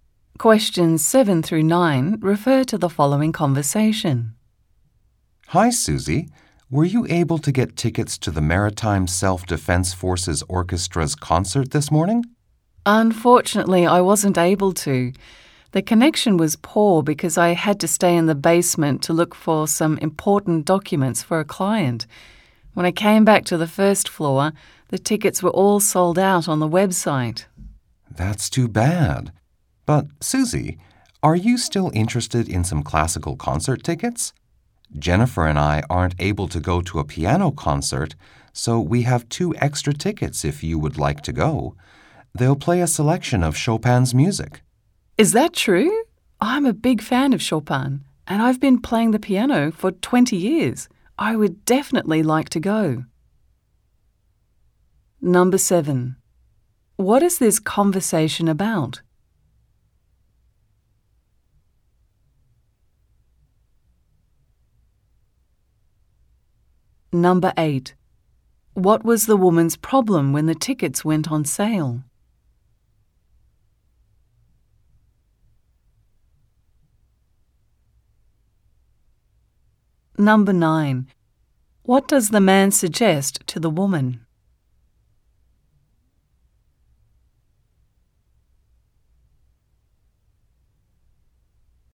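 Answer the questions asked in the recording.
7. Getting concert tickets
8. She had a poor connection in the basement, and the tickets sold out
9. Going to a Chopin piano concert with his two extra tickets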